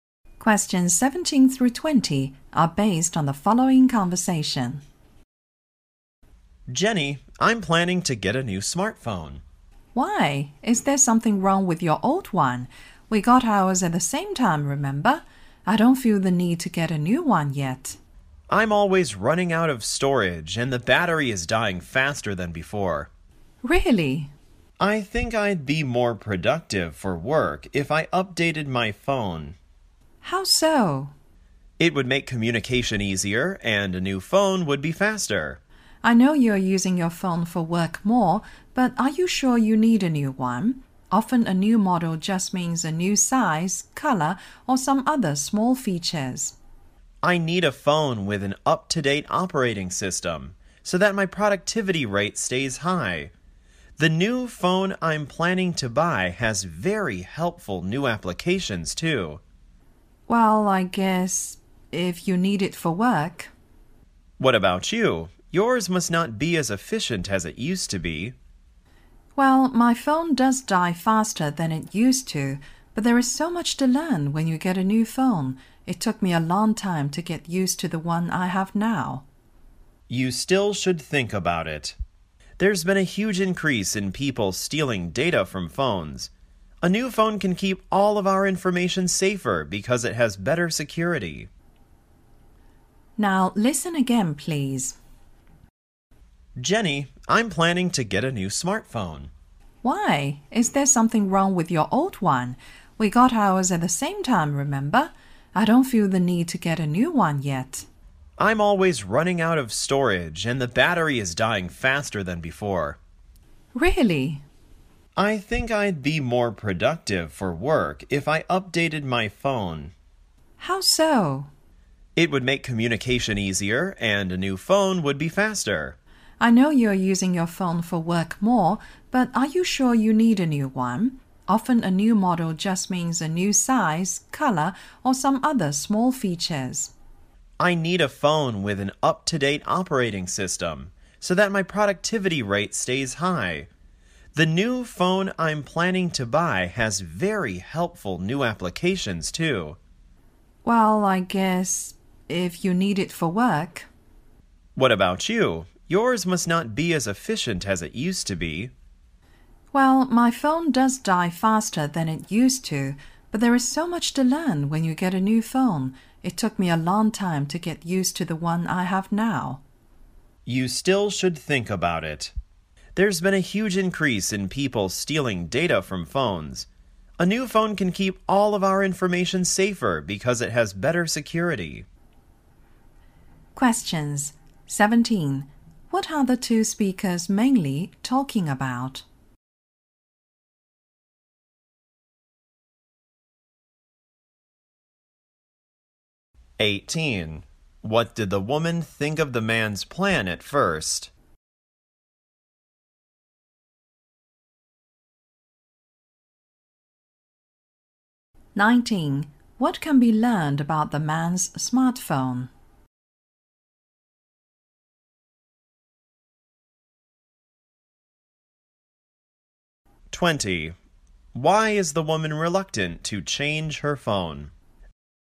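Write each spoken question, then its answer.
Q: What are the two speakers mainly talking about?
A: Whether to get a new smartphone

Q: What did the woman think of the man's plan at first?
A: She thought it was unnecessary

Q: What can be learned about the man's smartphone?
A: It is always running out of storage and its battery dies faster

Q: Why is the woman reluctant to change her phone?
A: There is so much to learn when you get a new phone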